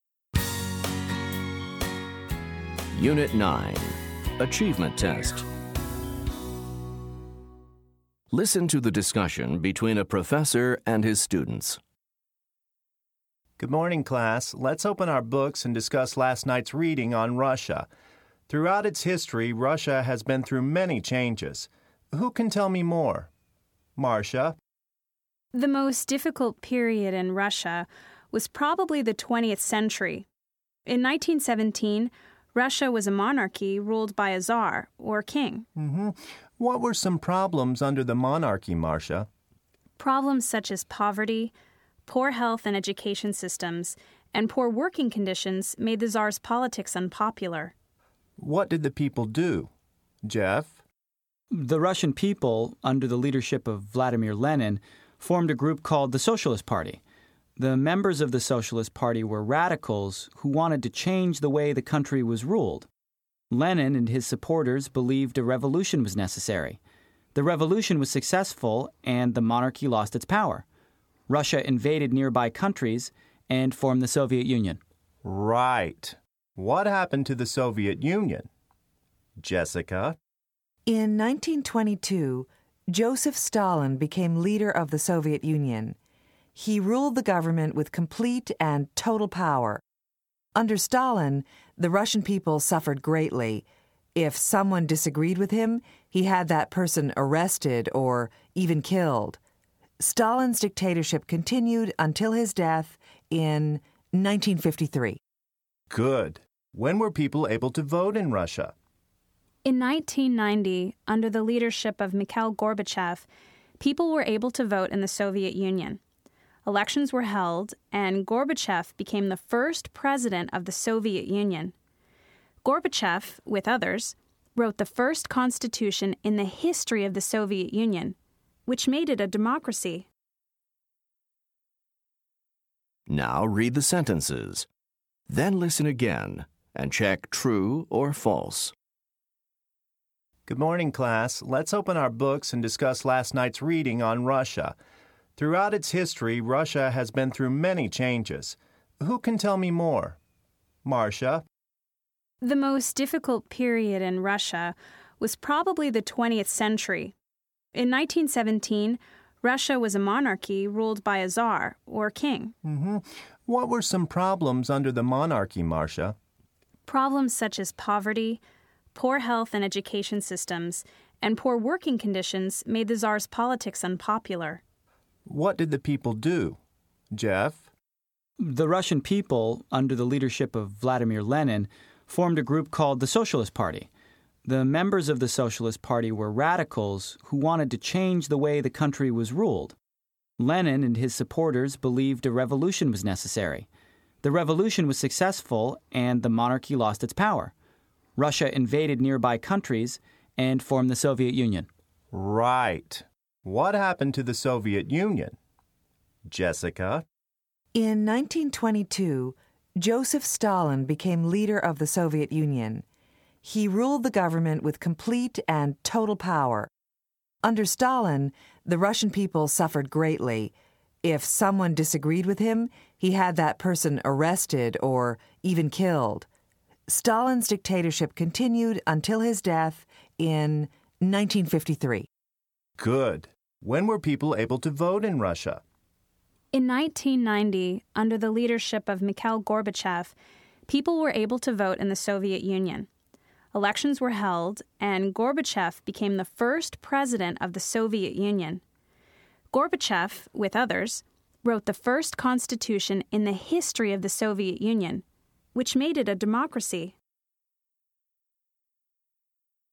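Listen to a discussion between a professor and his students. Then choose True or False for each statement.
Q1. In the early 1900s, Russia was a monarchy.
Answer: True

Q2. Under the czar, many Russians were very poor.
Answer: True

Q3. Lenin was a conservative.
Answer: False

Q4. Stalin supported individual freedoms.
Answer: False

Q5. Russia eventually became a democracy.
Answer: True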